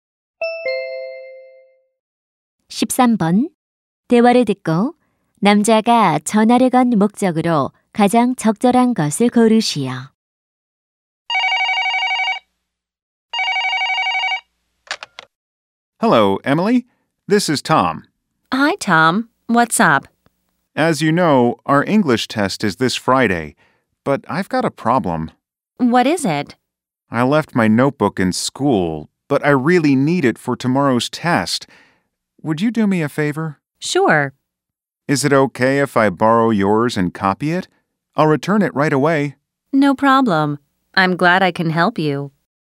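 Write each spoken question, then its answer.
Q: 대화를 듣고 남자가 전화를 건 목적으로 가장 적절한 것을 고르시오.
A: 공책을 빌리기 위해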